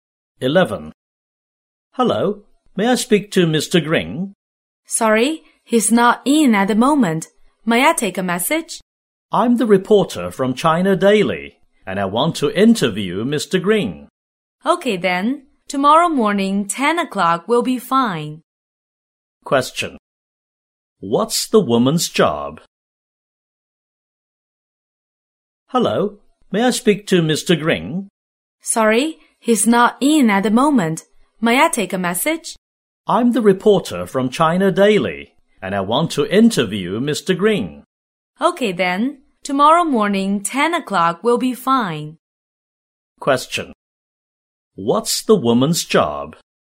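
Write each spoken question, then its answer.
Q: What's the woman's job?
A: A reporter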